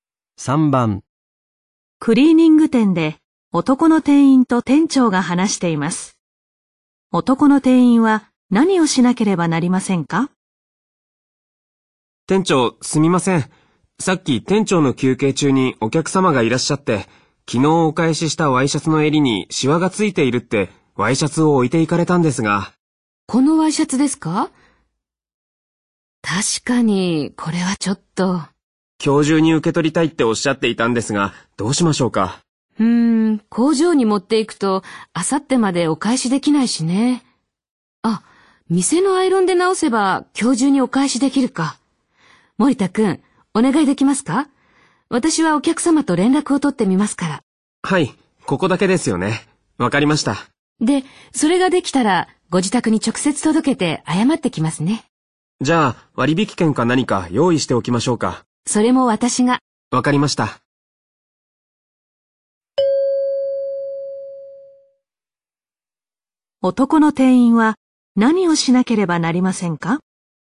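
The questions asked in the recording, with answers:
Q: 男の店員は何をしなければなりませんか?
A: 店のアイロンでワイシャツの襟のシワを直す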